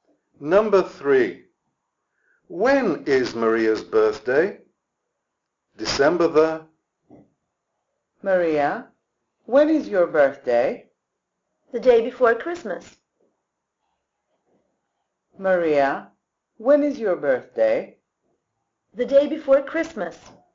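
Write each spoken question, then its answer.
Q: When is Maria's birthday?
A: December 24th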